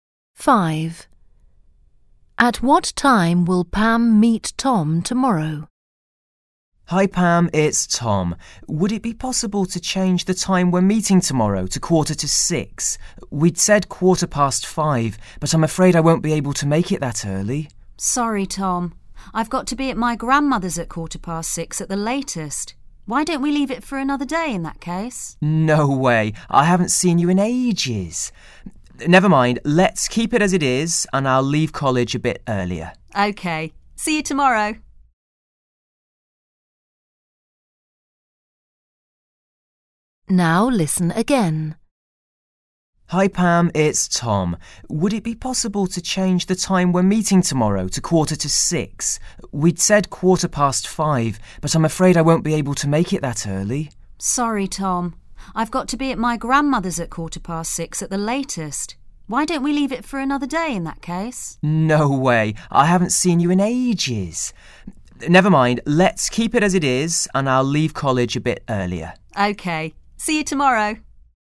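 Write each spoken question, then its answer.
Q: At what time will Pam meet Tom tomorrow?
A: 5:15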